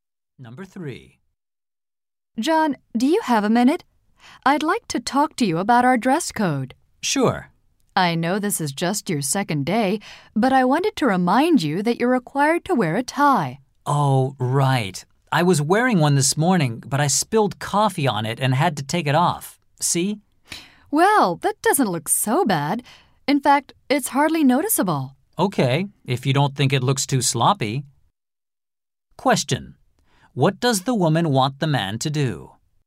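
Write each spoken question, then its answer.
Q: What does the woman want the man to do?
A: Wear a tie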